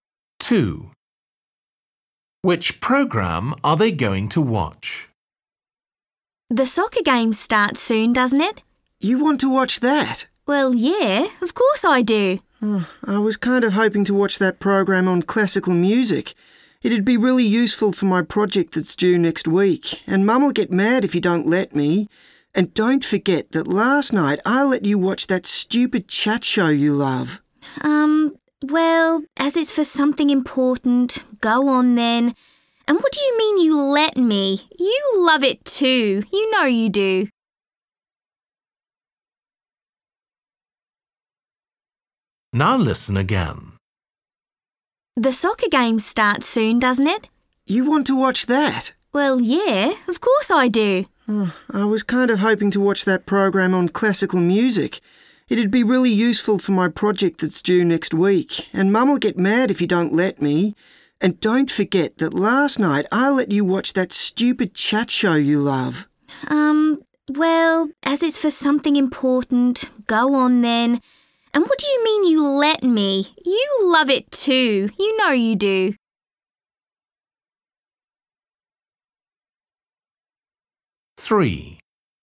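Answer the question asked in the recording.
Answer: the program on classical music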